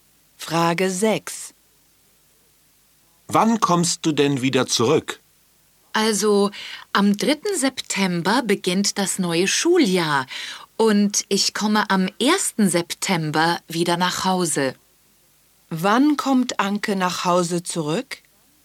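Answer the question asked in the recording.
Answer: Am 1. September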